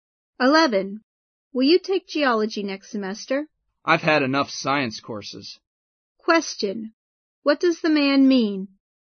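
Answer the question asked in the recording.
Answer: He doesn't want to take geology because he has taken enough science courses.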